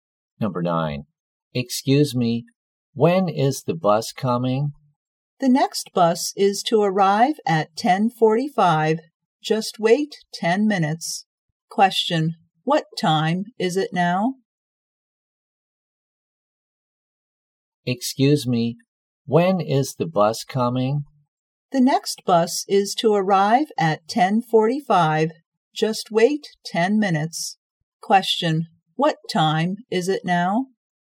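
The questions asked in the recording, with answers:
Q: what time is it now?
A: 10:35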